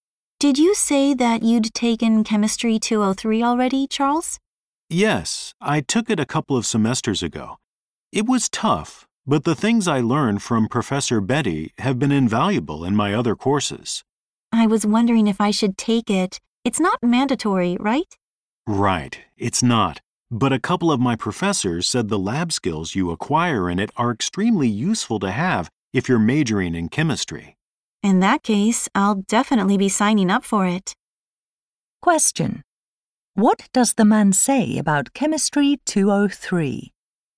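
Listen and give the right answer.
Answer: It teaches lab skills that are very useful for chemistry majors.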